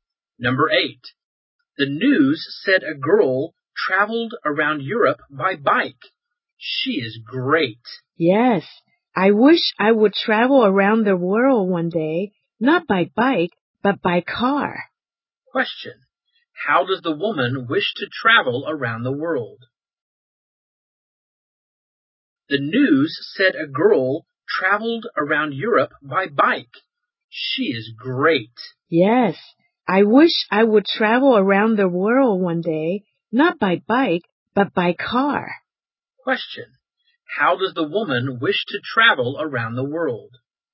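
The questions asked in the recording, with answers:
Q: How does the woman wish to travel around the world?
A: By car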